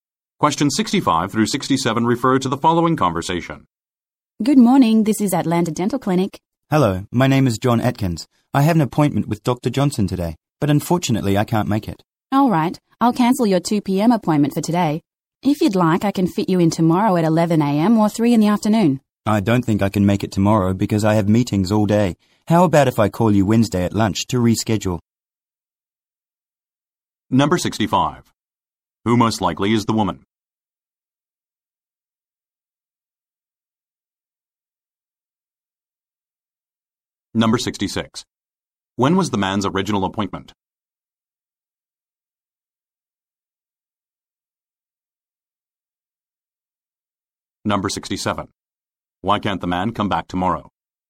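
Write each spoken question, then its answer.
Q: Who most likely is the woman?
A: A receptionist at a dental clinic

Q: When was the man's original appointment?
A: At 2 p.m. today

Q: Why can't the man come back tomorrow?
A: He has meetings all day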